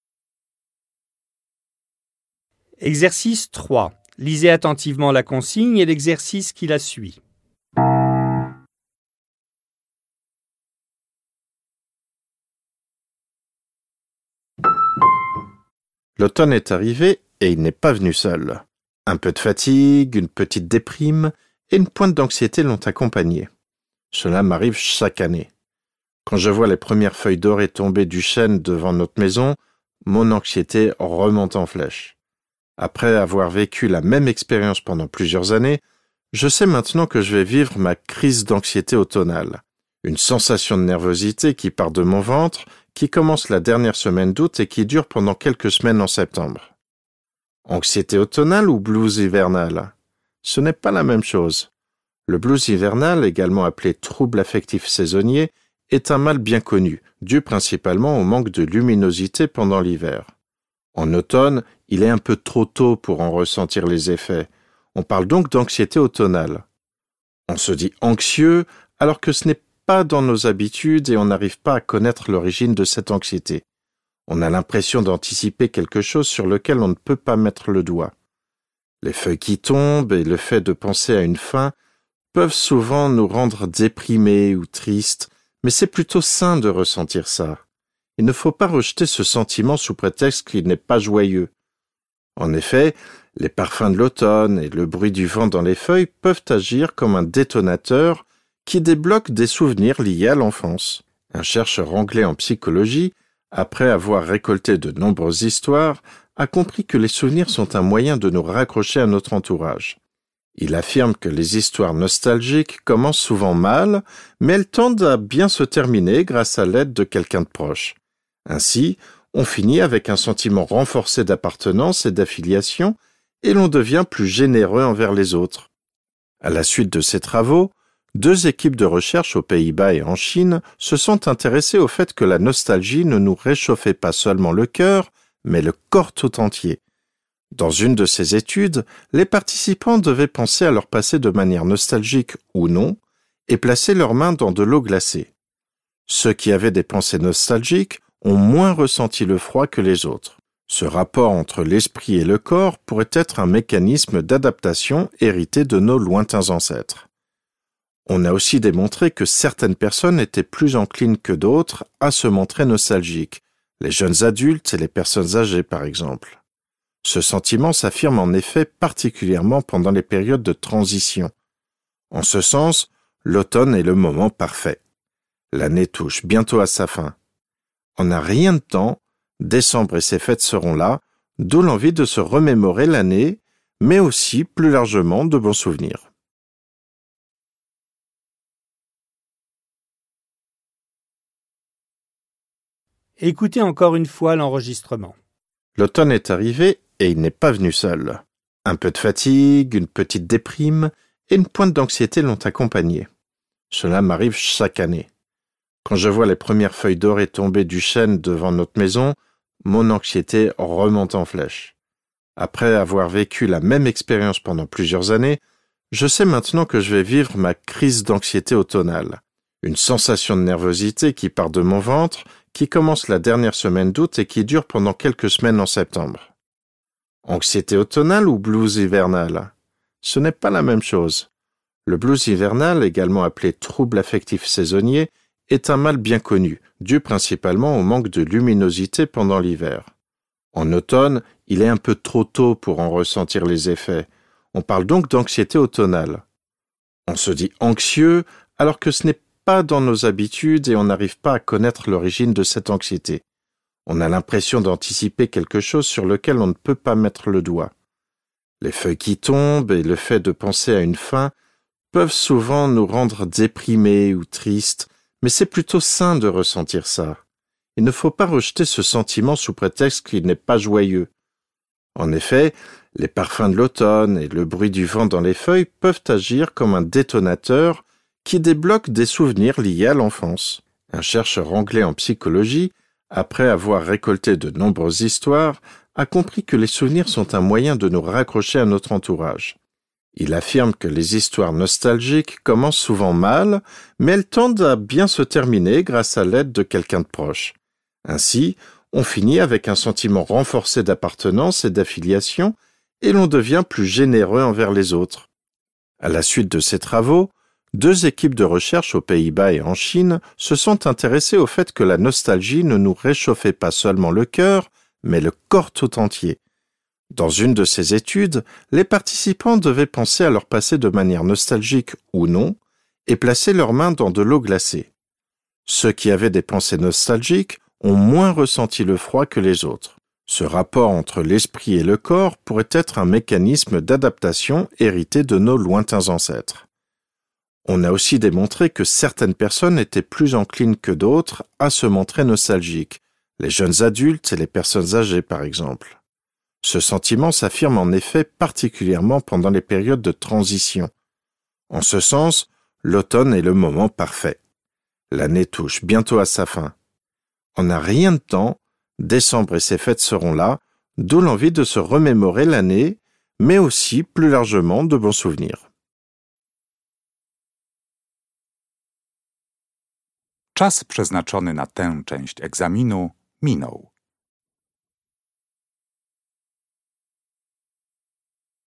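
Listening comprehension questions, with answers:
Vous allez écouter deux fois un document. Complétez les phrases 3.1–3.4 conformément au sens de l'enregistrement.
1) L'anxiété automnale dure quelques semaines et ses premiers signes apparaissent chez le narrateur pendant .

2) est à l'origine du blues hivernal.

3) Du point de vue social, grâce aux souvenirs nostalgiques, nous .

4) Selon différents chercheurs contemporains, l'influence de l'esprit sur le corps serait .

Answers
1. la dernière semaine d'août
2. Le manque de luminosité pendant l'hiver
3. devenons plus généreux envers les autres
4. un mécanisme d'adaptation hérité de nos lointains ancêtres

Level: dwujęzyczny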